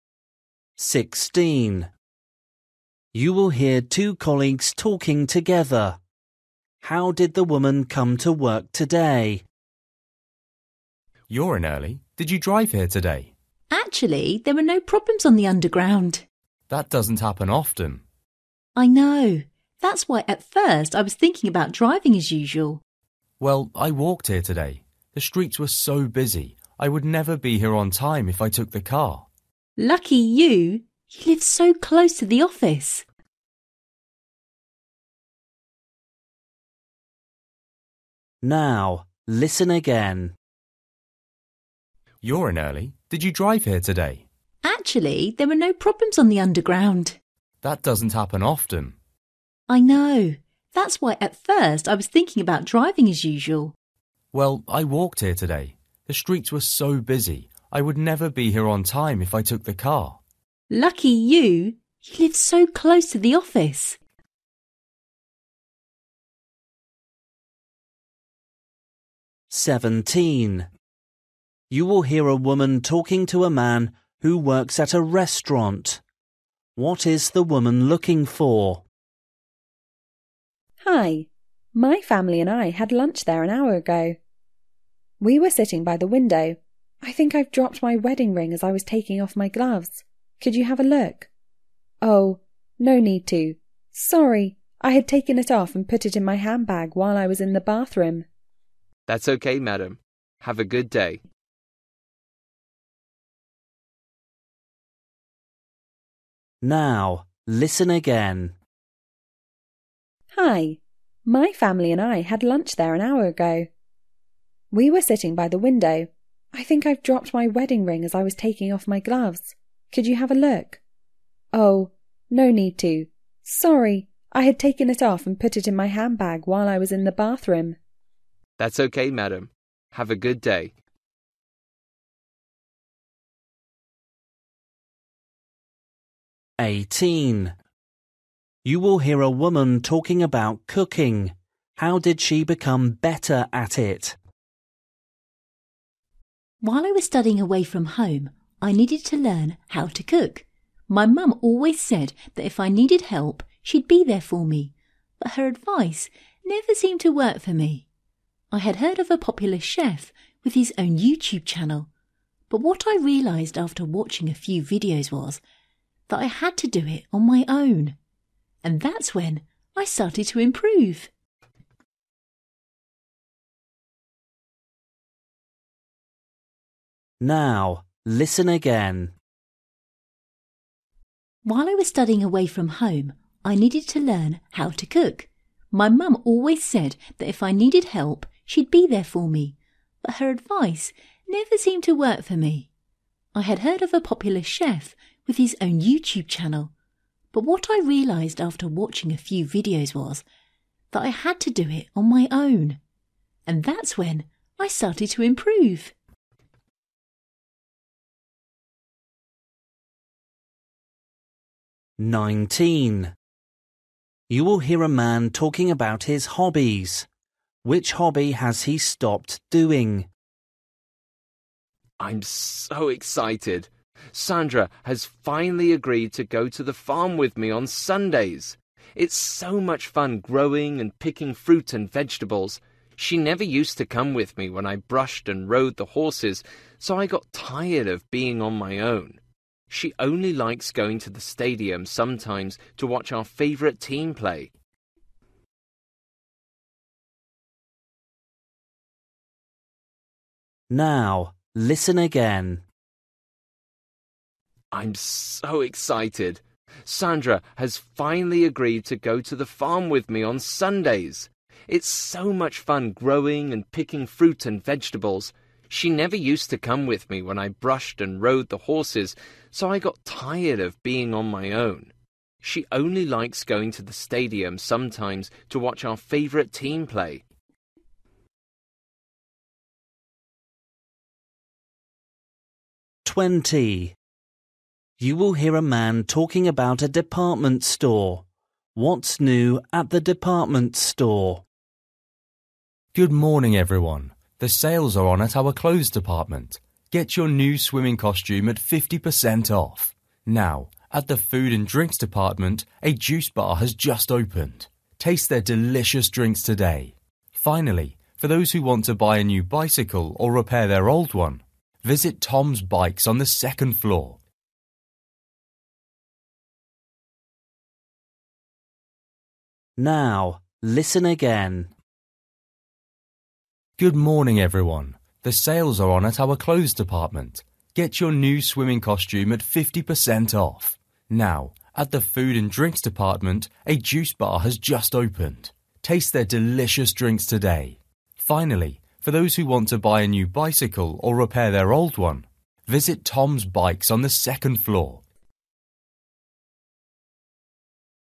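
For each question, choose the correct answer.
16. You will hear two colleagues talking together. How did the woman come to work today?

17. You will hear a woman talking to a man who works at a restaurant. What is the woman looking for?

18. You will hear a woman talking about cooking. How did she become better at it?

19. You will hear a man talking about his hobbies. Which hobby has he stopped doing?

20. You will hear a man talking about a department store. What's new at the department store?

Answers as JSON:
{"16": "She walked.", "17": "Her wedding ring.", "18": "By doing it on her own.", "19": "Horse riding.", "20": "A juice bar."}

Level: Luyện nghe trình độ A2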